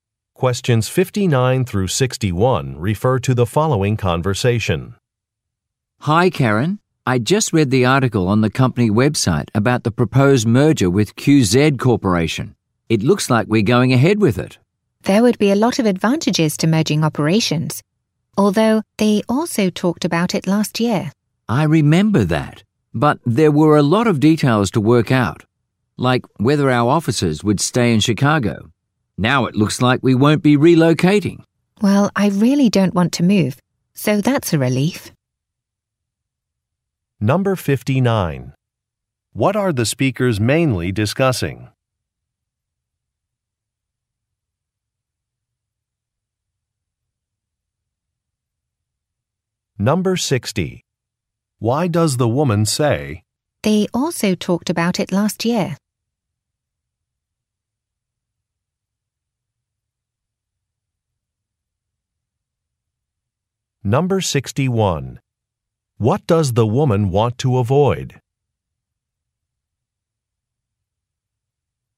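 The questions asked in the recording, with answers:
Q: What are the speakers mainly discussing?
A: A proposed company merger

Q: What does the woman want to avoid?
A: Relocating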